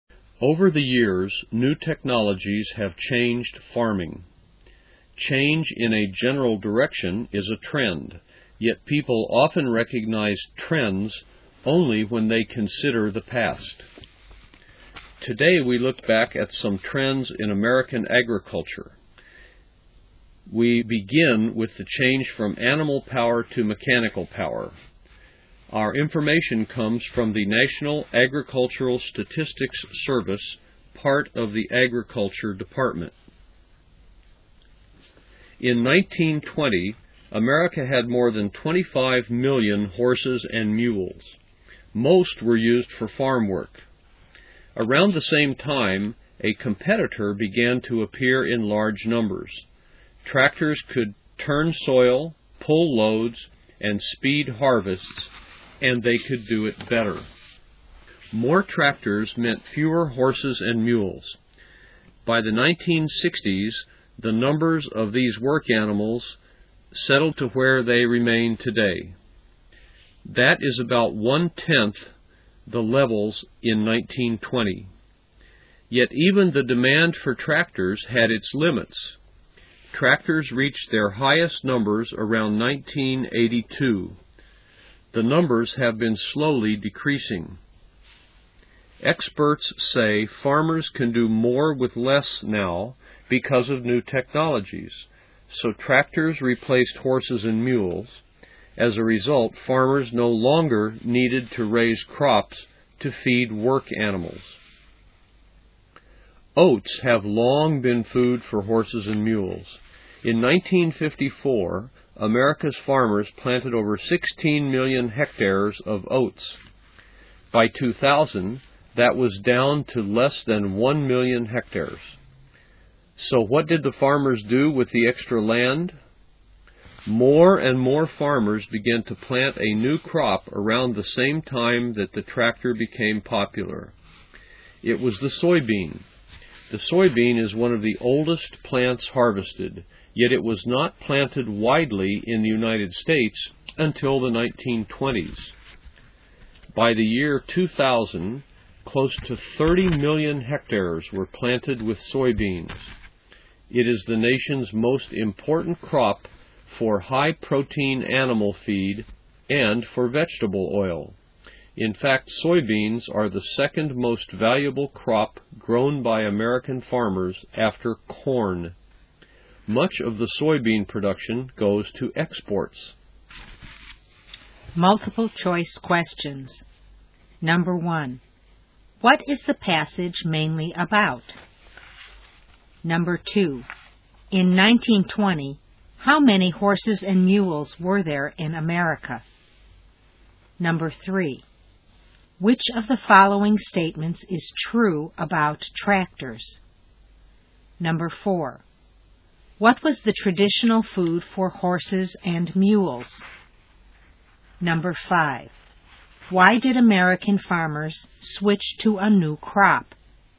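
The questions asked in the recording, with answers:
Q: what is the passage mainly about?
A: Trends in American agriculture

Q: in 1920, how many horses and mules were there in America?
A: More than 25 million

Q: what was the traditional food for horses and mules?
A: Oats

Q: why did American farmers switch to a new crop?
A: Tractors replaced work animals, so oats were no longer needed and land was freed up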